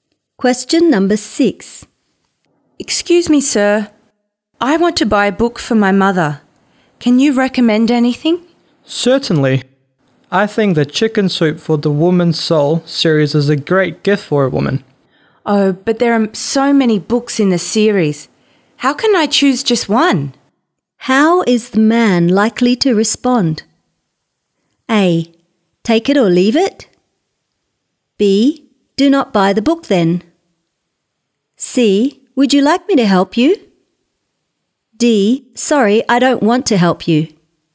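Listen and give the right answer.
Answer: C: Would you like me to help you?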